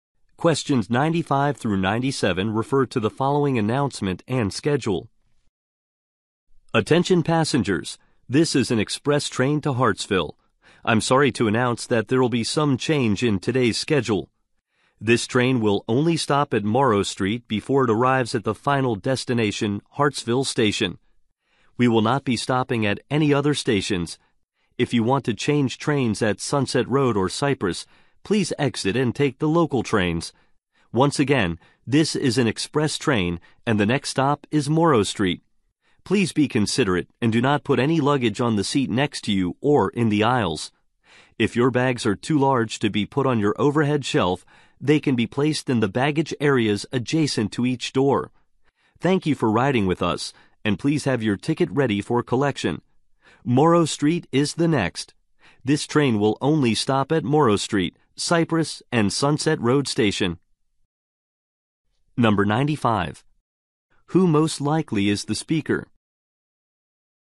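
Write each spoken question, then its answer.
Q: Who most likely is the speaker?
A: A train conductor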